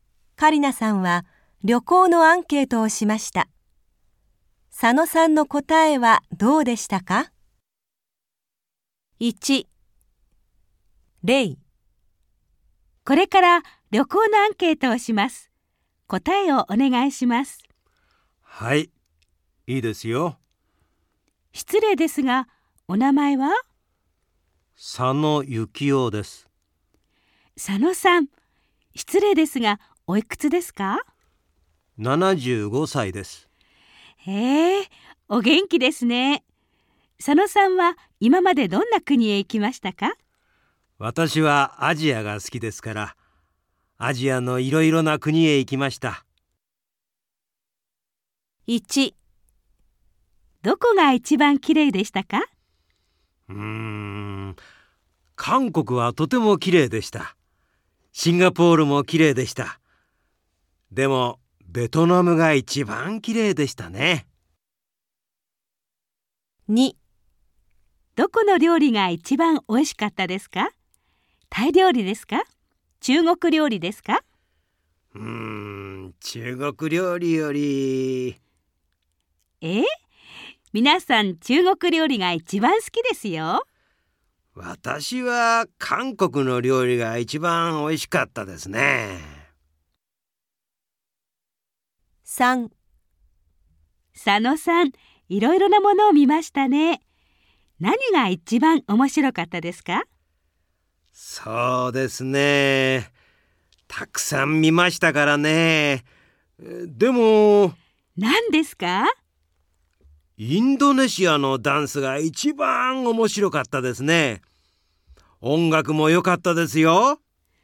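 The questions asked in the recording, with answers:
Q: どこが一番きれいでしたか?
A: ベトナム

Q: どこの料理が一番おいしかったですか?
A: 韓国の料理

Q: 何が一番面白かったですか?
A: インドネシアのダンス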